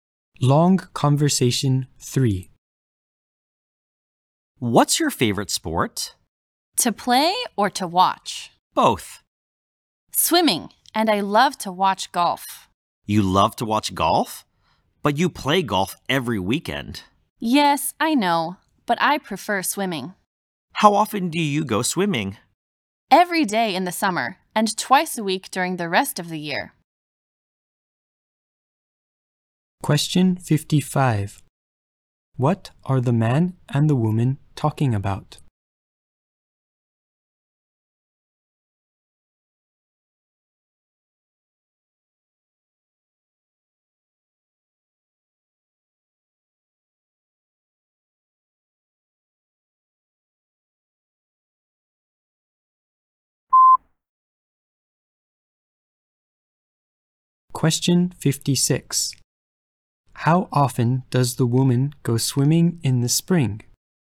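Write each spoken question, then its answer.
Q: What are the man and the woman talking about?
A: Their favorite sports

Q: How often does the woman go swimming in the spring?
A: Twice a week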